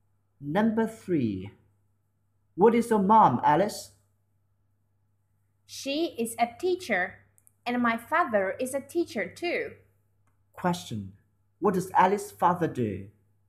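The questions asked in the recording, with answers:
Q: Question. What does Alice's father do?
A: He is a teacher.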